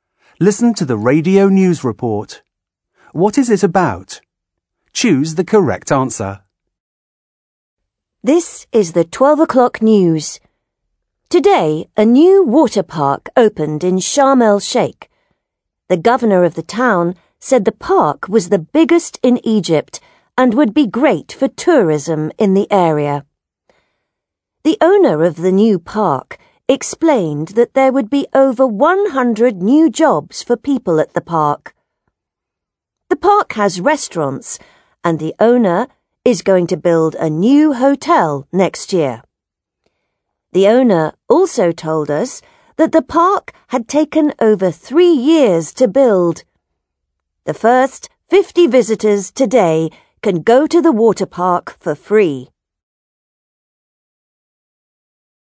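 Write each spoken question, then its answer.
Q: What is it about?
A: The opening of a new water park in Sharm el-Sheikh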